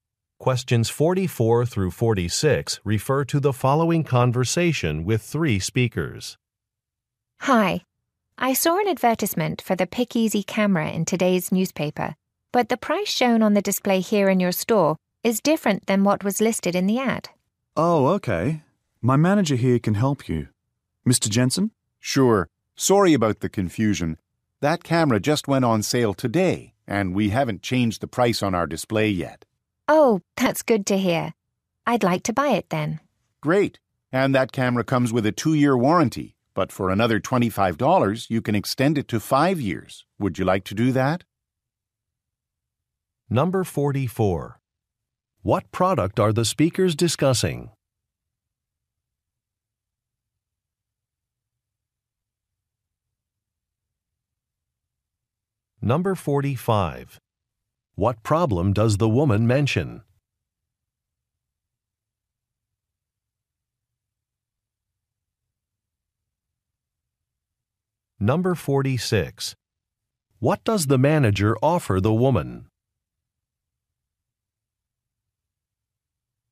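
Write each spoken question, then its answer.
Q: What product are the speakers discussing?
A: A camera

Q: What problem does the woman mention?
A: The displayed price differs from the advertised price

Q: What does the manager offer the woman?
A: An extended warranty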